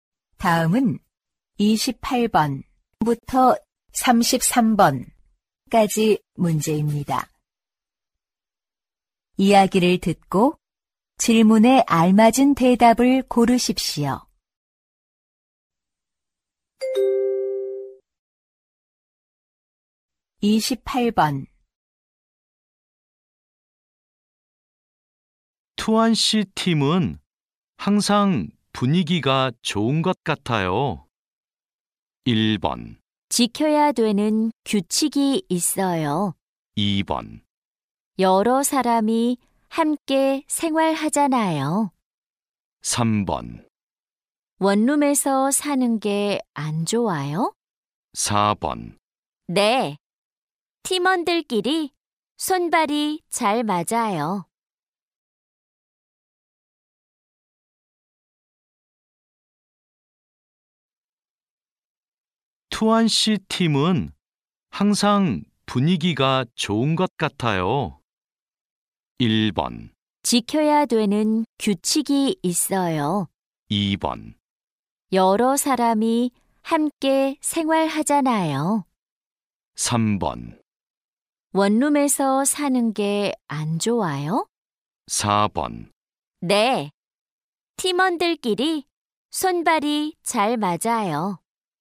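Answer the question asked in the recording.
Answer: 4: 네, 팀원들끼리 손발이 잘 맞아요.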